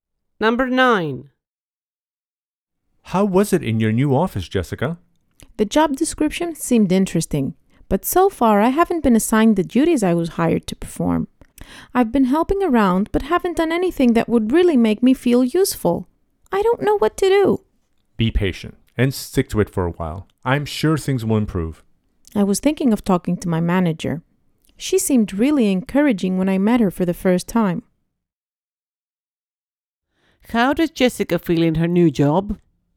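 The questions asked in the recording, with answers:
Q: How does Jessica feel in her new job?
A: Not useful, because she hasn't been given the duties she was hired for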